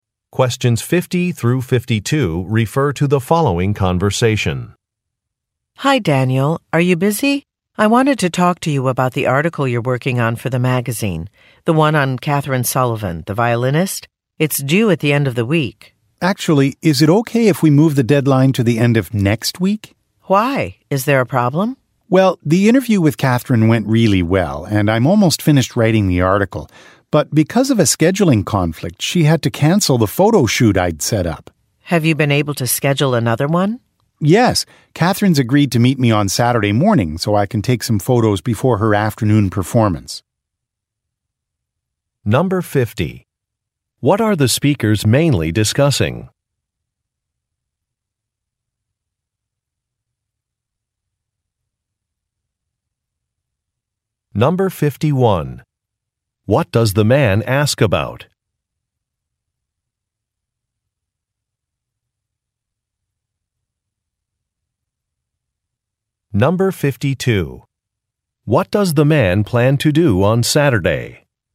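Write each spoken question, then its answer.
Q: What are the speakers mainly discussing?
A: A magazine article about the violinist Catherine Sullivan

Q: What does the man ask about?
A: Moving the article's deadline to the end of next week

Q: What does the man plan to do on Saturday?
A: Take photos of Catherine before her afternoon performance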